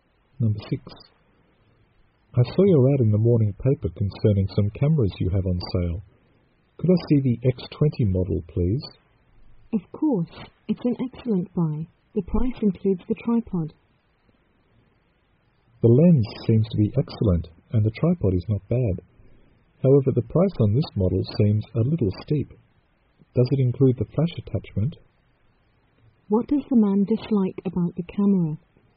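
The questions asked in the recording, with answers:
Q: What does the man dislike about the camera?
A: The price is too high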